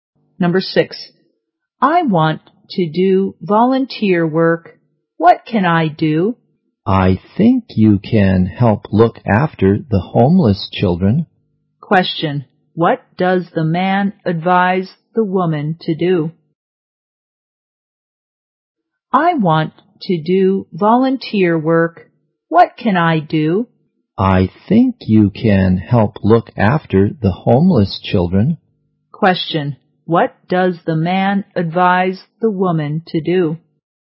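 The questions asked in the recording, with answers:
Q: What does the man advise the woman to do?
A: Help look after the homeless children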